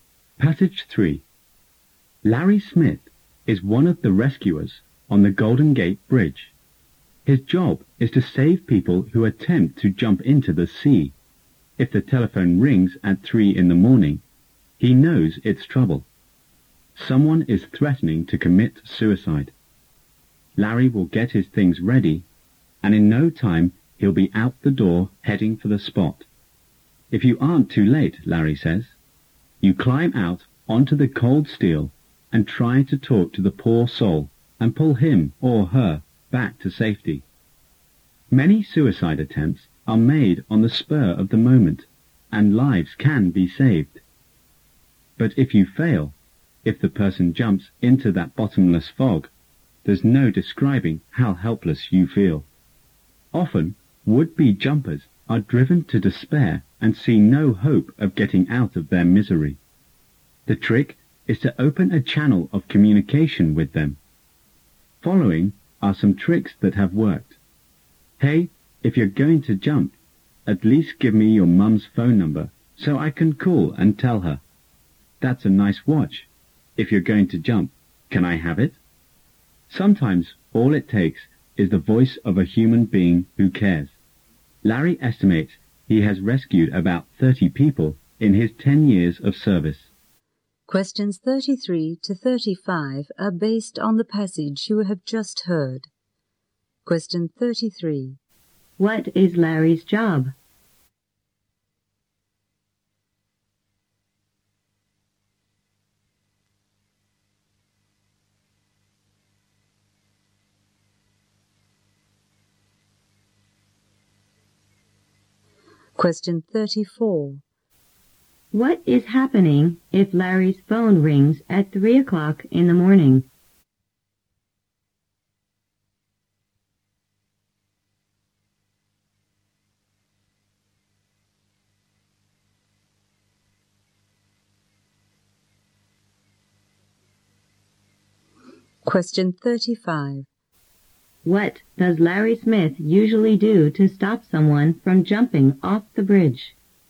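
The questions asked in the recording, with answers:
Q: What is Larry's job?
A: Rescuing people trying to jump off the Golden Gate Bridge

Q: What is happening if Larry's phone rings at 3 o'clock in the morning?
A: Someone is threatening to commit suicide

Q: What does Larry Smith usually do to stop someone from jumping off the bridge?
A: He talks to them to open communication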